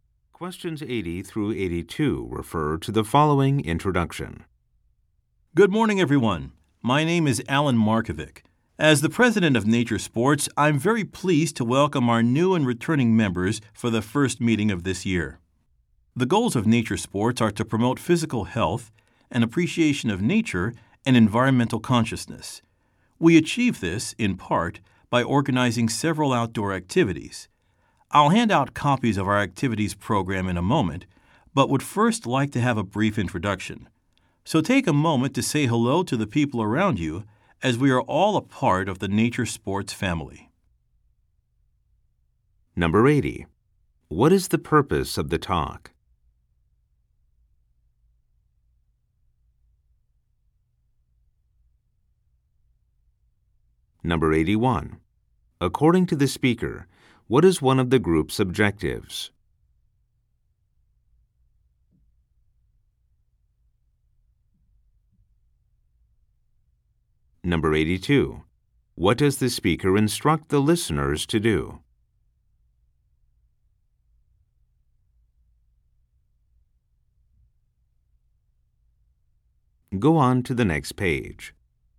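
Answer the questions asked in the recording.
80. To welcome members to the first meeting of the year
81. To promote physical health and appreciation of nature
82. Say hello to the people around them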